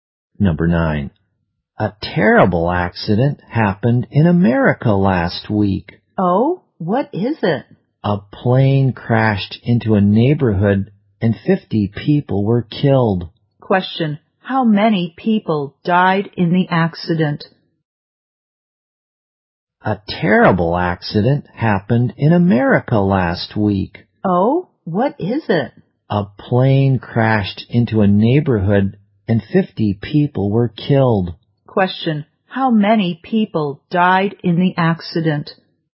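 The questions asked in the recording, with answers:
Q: How many people died in the accident?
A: 50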